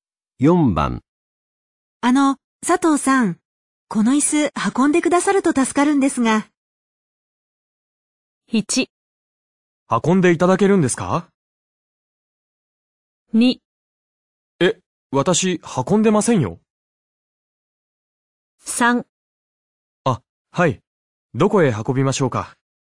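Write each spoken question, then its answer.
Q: あの、佐藤さん、この椅子運んでくださると助かるんですが。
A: 3: あ、はい。どこへ運びましょうか?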